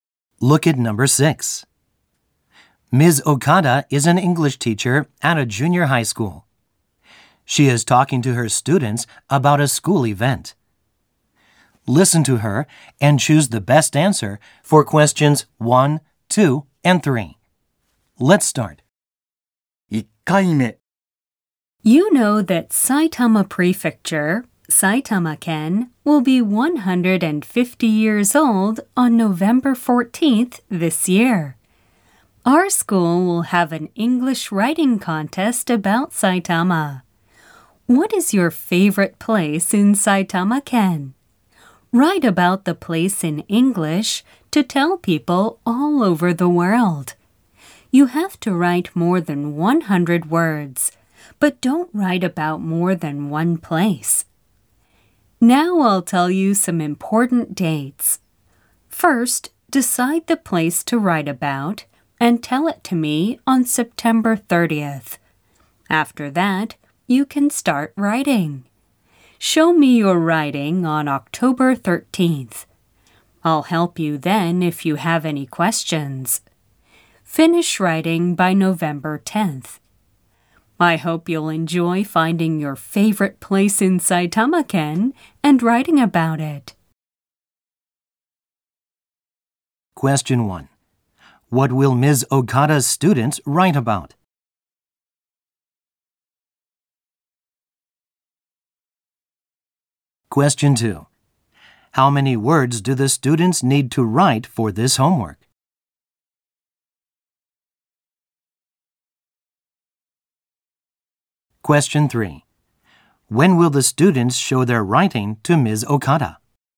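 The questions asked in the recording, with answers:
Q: What will Ms. Okada's students write about?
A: Their favorite place in Saitama-ken

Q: How many words do the students need to write for this homework?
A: More than 100 words

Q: When will the students show their writing to Ms. Okada?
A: On October 13th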